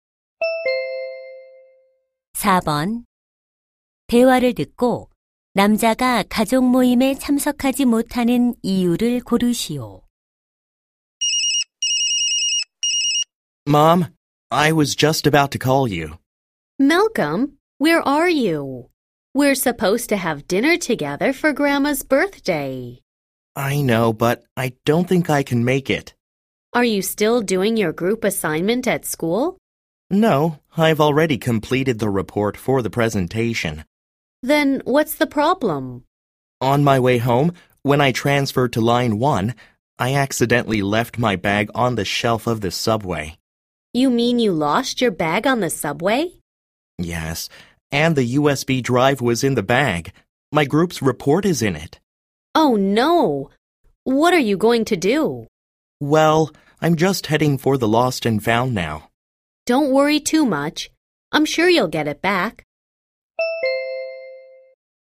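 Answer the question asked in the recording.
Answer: 지하철에 두고 내린 가방을 찾으러 분실물 센터에 가야 해서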